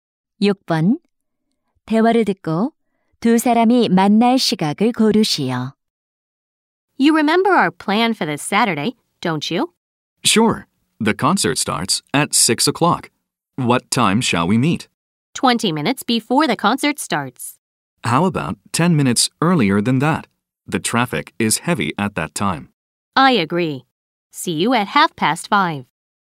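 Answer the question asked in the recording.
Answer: 5시 30분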